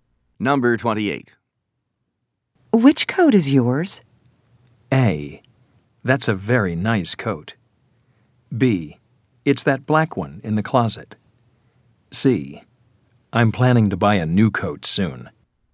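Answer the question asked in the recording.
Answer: B: It's that black one in the closet.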